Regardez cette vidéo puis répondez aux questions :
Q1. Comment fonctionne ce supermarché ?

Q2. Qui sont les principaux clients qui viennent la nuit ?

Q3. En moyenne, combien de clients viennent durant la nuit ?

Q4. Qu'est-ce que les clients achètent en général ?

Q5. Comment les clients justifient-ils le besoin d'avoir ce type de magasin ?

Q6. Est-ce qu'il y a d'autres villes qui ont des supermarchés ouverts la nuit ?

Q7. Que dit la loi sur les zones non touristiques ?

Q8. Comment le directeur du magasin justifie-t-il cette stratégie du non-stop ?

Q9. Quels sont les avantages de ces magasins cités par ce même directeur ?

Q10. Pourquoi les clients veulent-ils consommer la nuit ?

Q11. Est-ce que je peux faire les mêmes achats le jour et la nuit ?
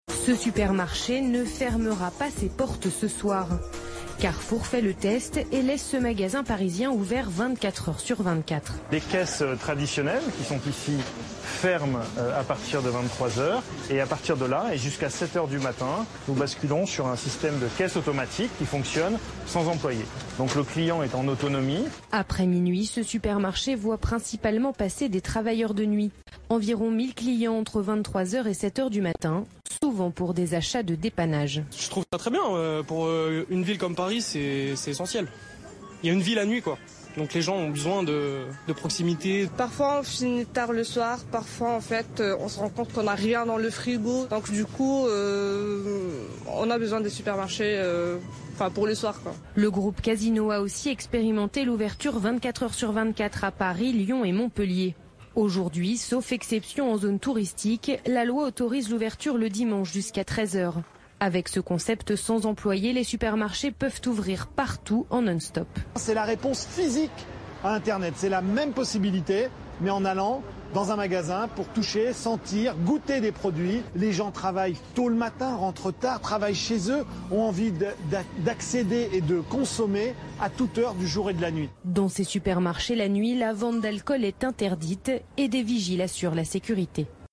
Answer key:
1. Les caisses traditionnelles fonctionnent jusqu'à 23 h, ensuite ce sont les caisses automatiques qui fonctionnent jusqu'à 7 h.
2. Ce sont principalement des travailleurs de nuit.
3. Environ 1000 clients.
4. Ils font des achats de dépannage.
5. C'est important pour une grande ville (Paris), car il y a une vie la nuit, on a besoin de proximité (l'homme).
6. Oui, à Lyon et à Montpelier.
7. L'ouverture le dimanche est autorisée jusqu'à 13 h (sauf zone touristique).
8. C'est parce que les supermarchés sont concurrencés par Internet.
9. Les clients peuvent toucher, sentir et goûter les produits (impossible sur Internet).
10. Parce que les gens travaillent tôt et terminent tard.
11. Non, car la vente d'alcool est interdite la nuit.

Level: Niveaux : B1/B2